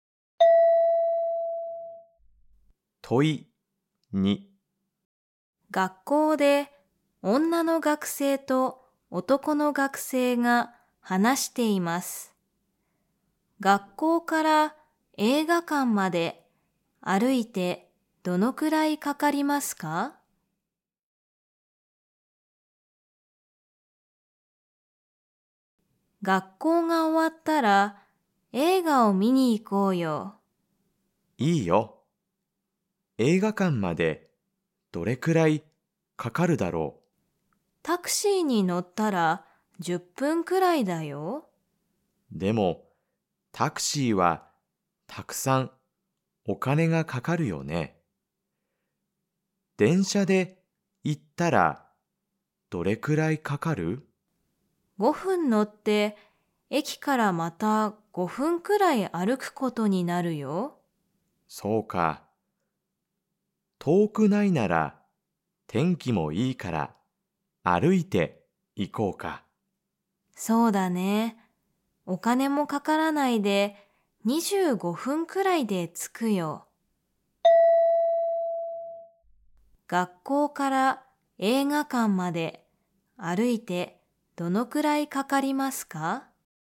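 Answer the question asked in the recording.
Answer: 25分くらい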